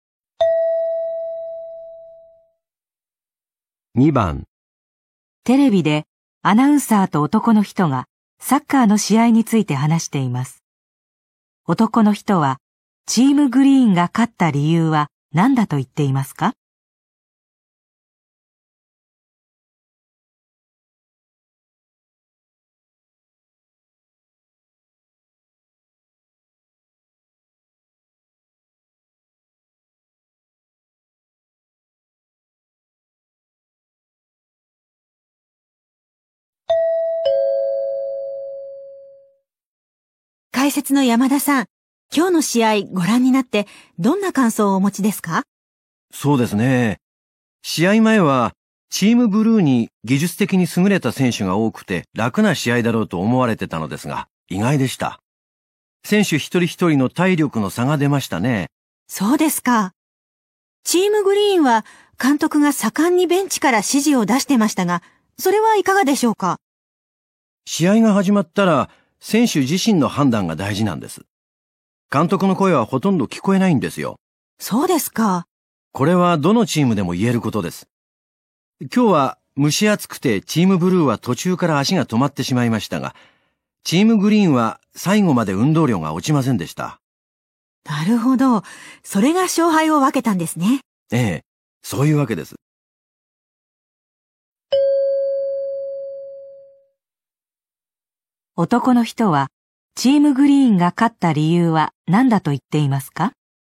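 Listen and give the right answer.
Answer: 最後まで運動量が落ちなかった(体力の差)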